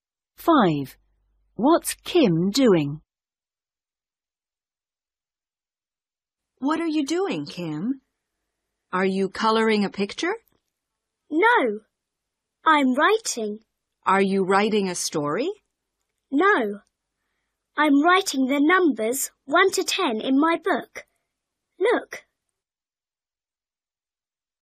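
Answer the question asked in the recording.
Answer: Writing the numbers 1 to 10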